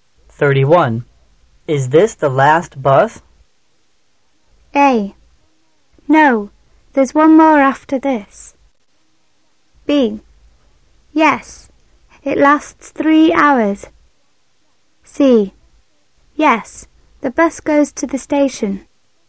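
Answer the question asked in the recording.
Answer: A: No, there's one more after this.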